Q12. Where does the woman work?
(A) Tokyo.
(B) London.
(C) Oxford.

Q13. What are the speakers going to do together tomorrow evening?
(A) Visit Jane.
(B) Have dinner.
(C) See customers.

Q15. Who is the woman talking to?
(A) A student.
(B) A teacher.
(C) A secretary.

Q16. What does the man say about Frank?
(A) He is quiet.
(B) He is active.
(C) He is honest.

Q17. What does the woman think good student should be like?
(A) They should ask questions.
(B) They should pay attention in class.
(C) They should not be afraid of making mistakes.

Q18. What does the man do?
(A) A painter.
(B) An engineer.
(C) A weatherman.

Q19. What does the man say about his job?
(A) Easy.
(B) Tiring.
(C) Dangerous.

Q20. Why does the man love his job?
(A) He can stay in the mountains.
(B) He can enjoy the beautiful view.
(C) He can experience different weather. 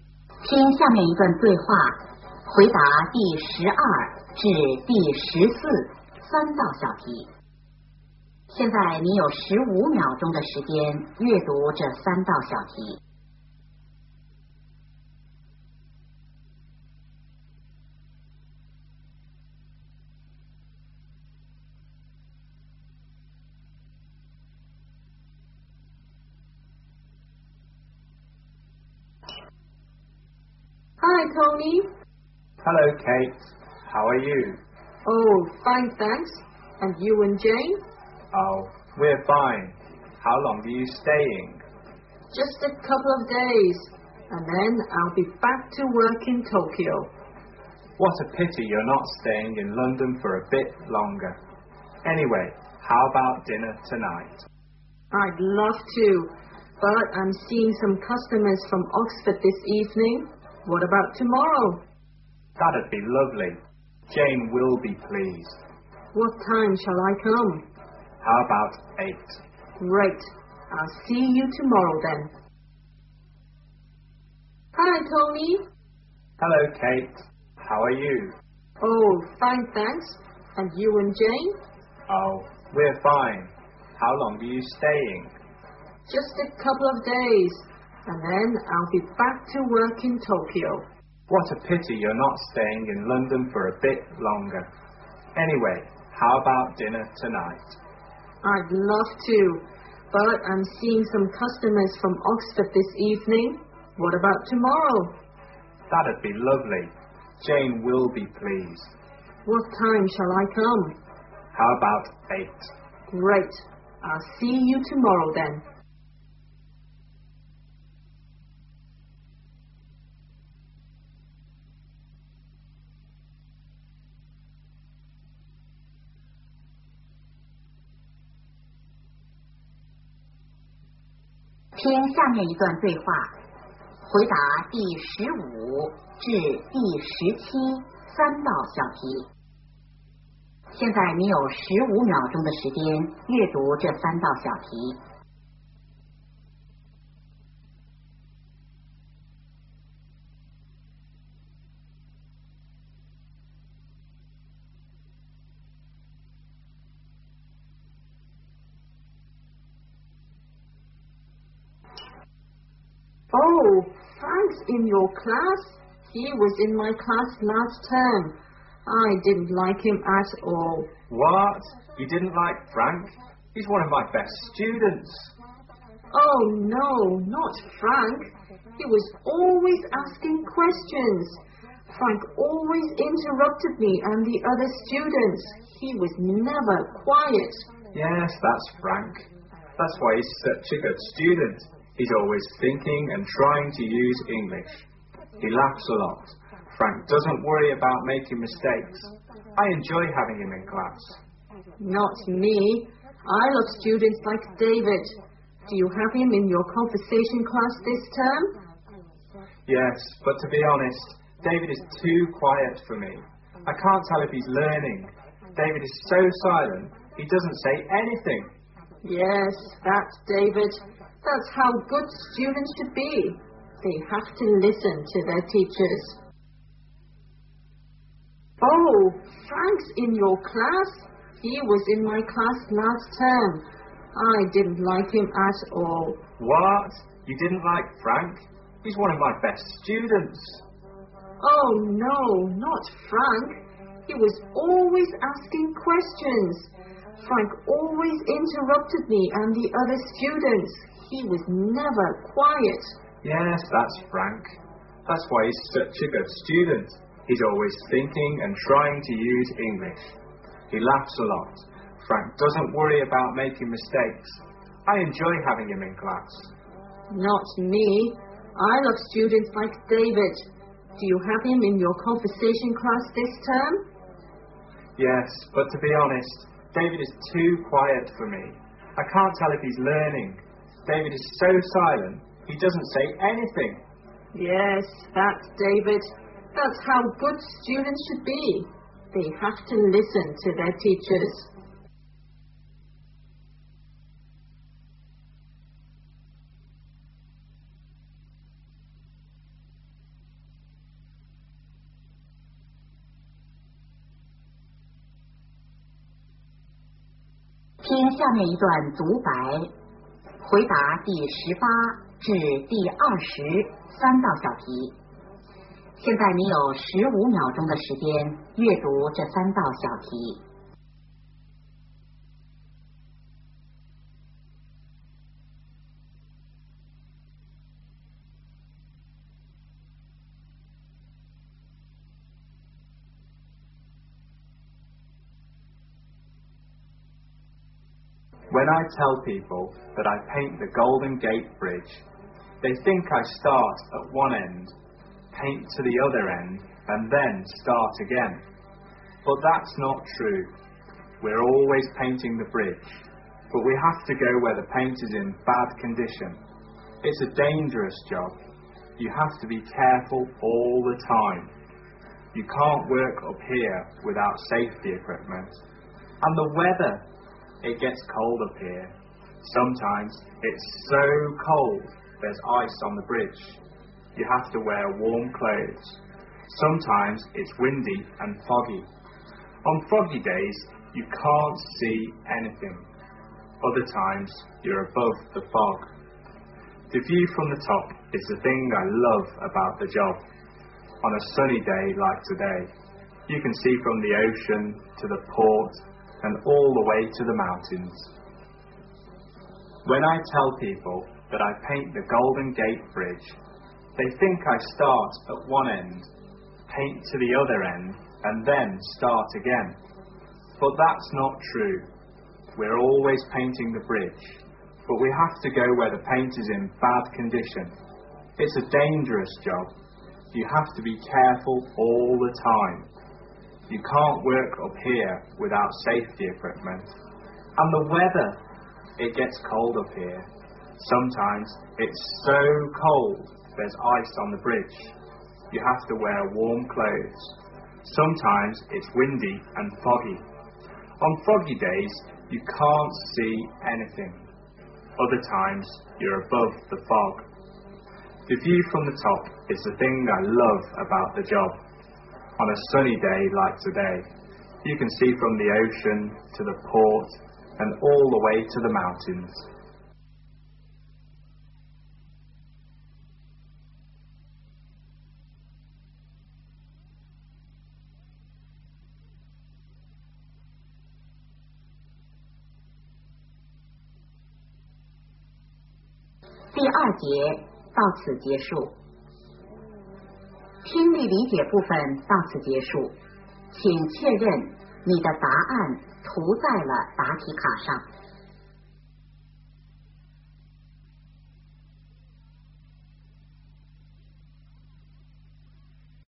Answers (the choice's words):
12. Tokyo.
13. Have dinner.
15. A teacher.
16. He is active.
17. They should pay attention in class.
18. A painter.
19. Dangerous.
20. He can enjoy the beautiful view.

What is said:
W: Hi, Tony!
M: Hello, Kate! How are you?
W: Oh, fine, thanks. And you and Jane?
M: Oh, we're fine. How long are you staying?
W: Just a couple of days. And then I'll be back to work in Tokyo.
M: What a pity you are not staying in London for a bit longer. Anyway, how about dinner tonight?
W: I'd love to, but I'm seeing some customers from Oxford this evening. What about tomorrow?
M: That'd be lovely. Jane will be pleased.
W: What time shall I come?
M: How about eight?
W: Great. I'll see you tomorrow then.
W: Oh, Frank's in your class? He was in my class last term. I didn't like him at all.
M: What? You didn't like Frank? He's one of my best students.
W: Oh, no. Not Frank! He was always asking questions. Frank always interrupted me and the other students. He was never quiet.
M: Yes, that's Frank. That's why he is such a good student. He is always thinking and trying to use English. He laughs a lot. Frank doesn't worry about making mistakes. I enjoy having him in class.
W: Not me. I love students like David. Do you have him in your conversation class this term?
M: Yes, but to be honest, David is too quiet for me. I can't tell if he's learning. David is so silent. He doesn't say anything.
W: Yes, that's David. That's how good students should be. They have to listen to their teachers.
M: When I tell people that I paint the Golden Gate Bridge, they think I start at one end, paint to the other end, and then start again. But that's not true. We are always painting the bridge. But we have to go where paint is in bad condition. It's a dangerous job. You have to be careful all the time. You can't work or appear without safety equipment. And the weather, it gets colder up here. Sometimes it's so cold there's ice on the bridge. You have to wear warm clothes. Sometimes it's windy and foggy. On foggy days, you can't see anything. Other times, you are both the fog. The view from the top is the thing that I love about the job. On a sunny day like today, you can see from the ocean to the port and all the way to the mountains.
答案:

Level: 高考